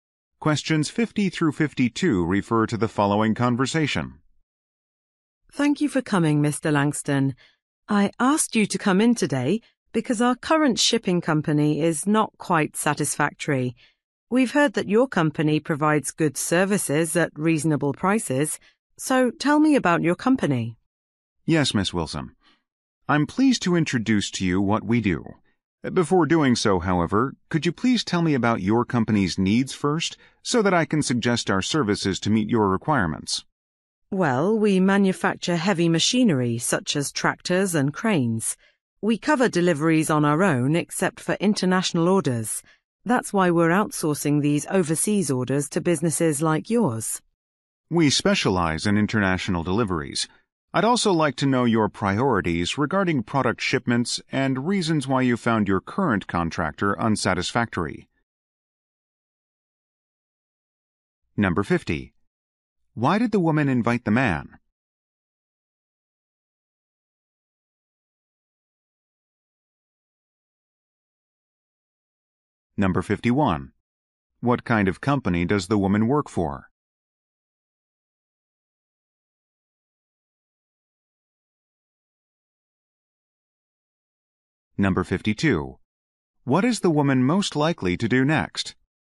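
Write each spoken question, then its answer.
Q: Why did the woman invite the man?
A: To learn about his shipping company's services

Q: What kind of company does the woman work for?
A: A heavy machinery manufacturer

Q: What is the woman most likely to do next?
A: Explain her company's shipping needs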